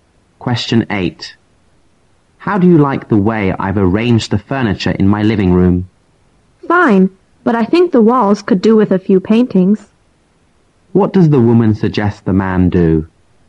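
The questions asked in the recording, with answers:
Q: What does the woman suggest the man do?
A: Hang some paintings on the walls.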